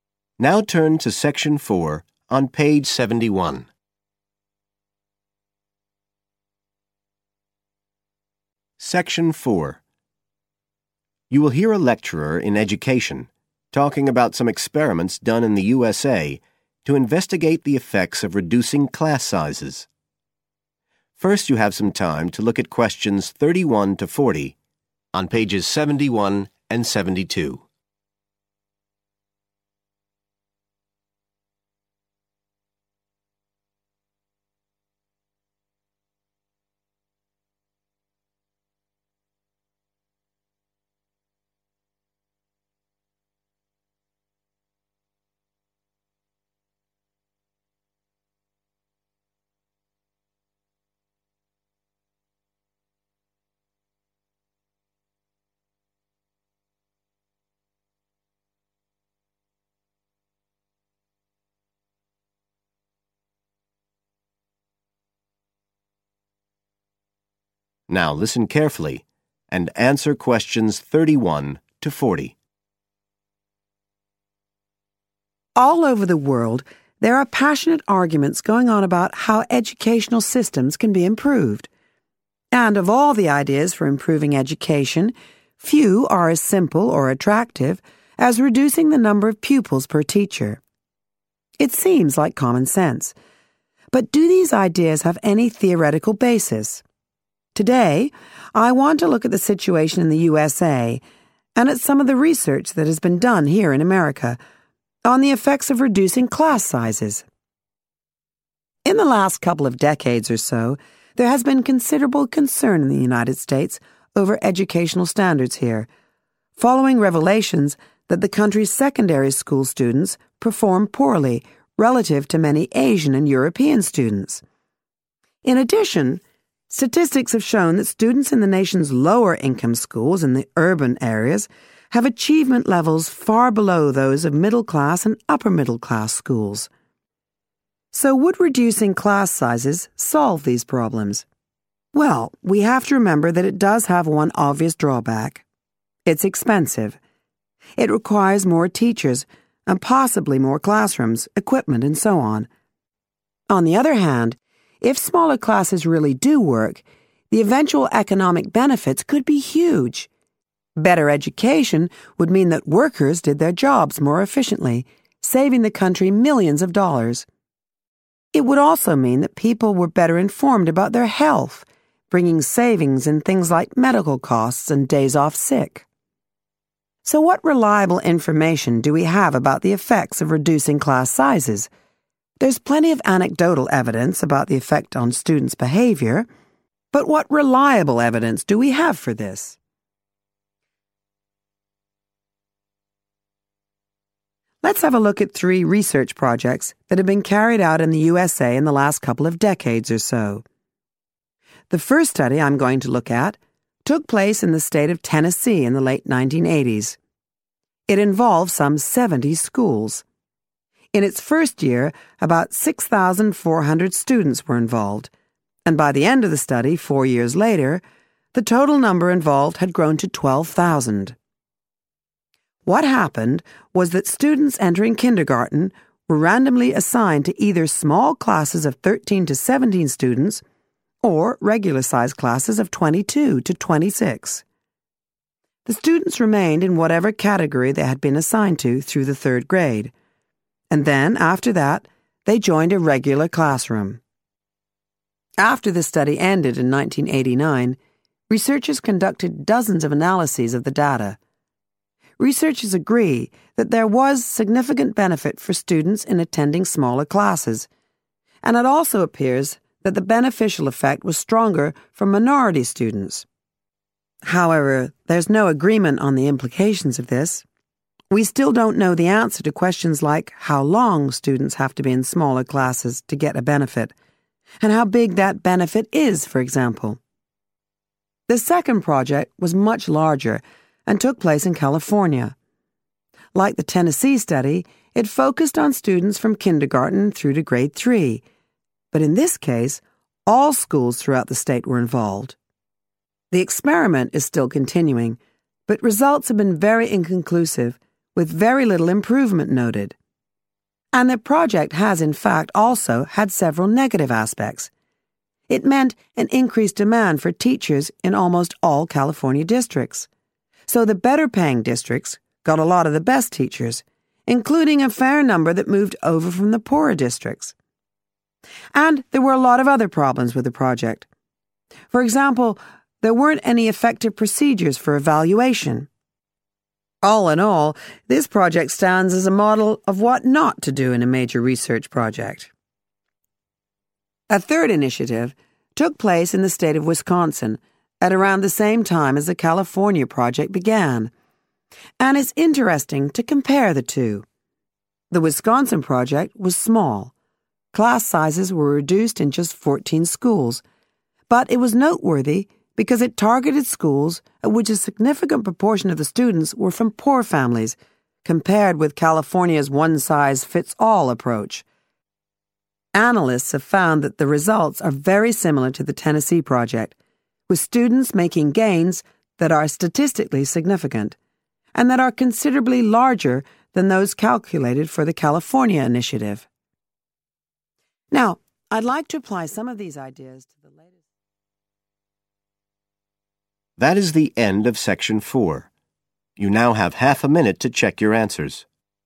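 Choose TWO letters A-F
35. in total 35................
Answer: 12,000

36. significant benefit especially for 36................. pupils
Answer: minority

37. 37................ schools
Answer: all

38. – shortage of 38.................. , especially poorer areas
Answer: teachers

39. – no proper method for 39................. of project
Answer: evaluation

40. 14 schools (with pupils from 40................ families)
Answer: poor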